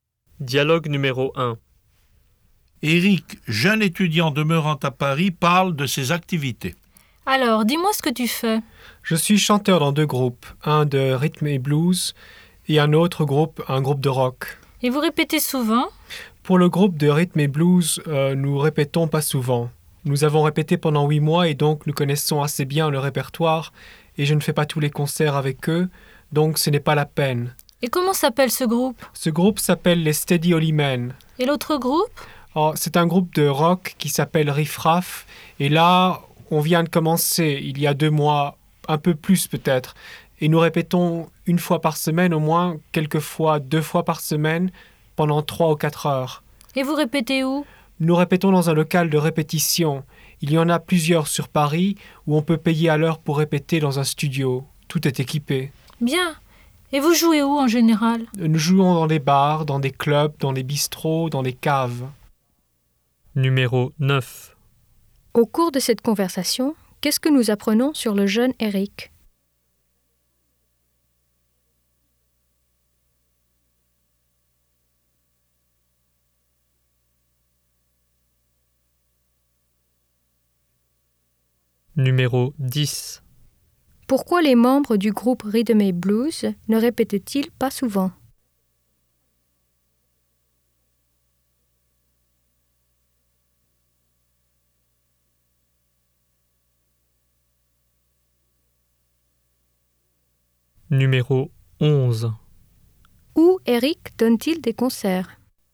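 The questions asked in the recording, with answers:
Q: Pourquoi les membres du groupe Rhythm & Blues ne répètent-ils pas souvent?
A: Ils connaissent déjà assez bien le répertoire.

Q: Où Éric donne-t-il des concerts?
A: Dans des bars, des clubs, des bistrots et des caves.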